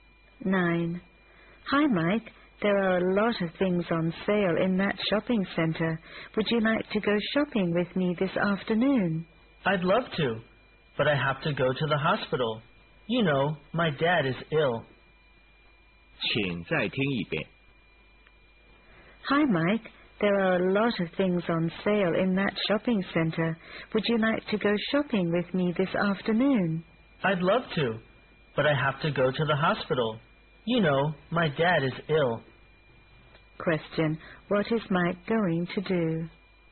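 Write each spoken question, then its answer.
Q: What is Mike going to do?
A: Go to the hospital (to see his ill dad)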